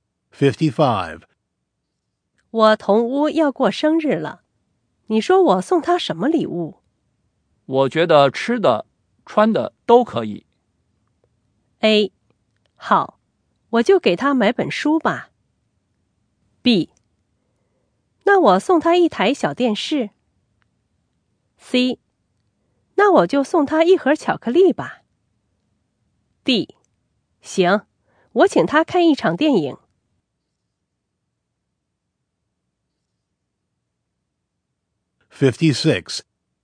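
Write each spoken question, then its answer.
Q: 我觉得吃的、穿的都可以。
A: C: 那我就送他一盒巧克力吧。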